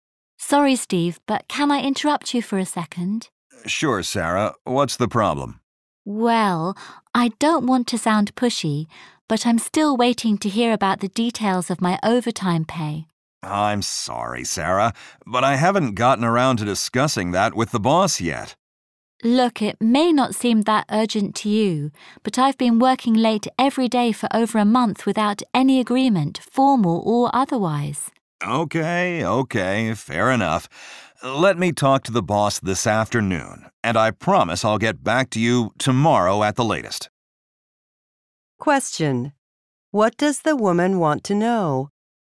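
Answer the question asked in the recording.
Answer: The details of her overtime pay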